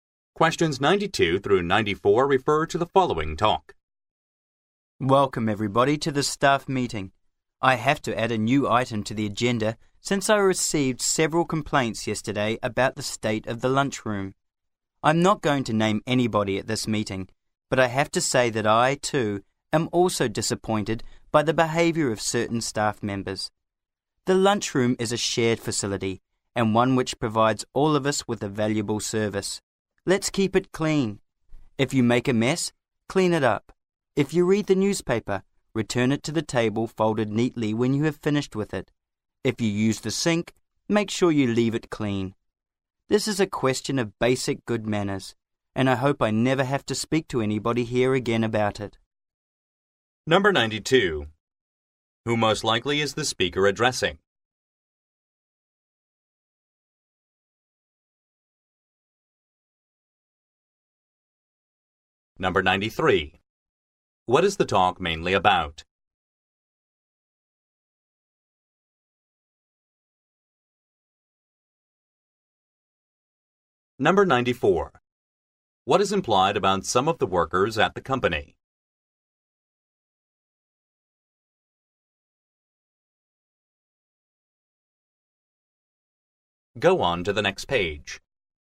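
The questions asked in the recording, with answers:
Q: Who most likely is the speaker addressing?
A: Staff members

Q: What is the talk mainly about?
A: Keeping the lunchroom clean

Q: What is implied about some of the workers at the company?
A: They have left the lunchroom messy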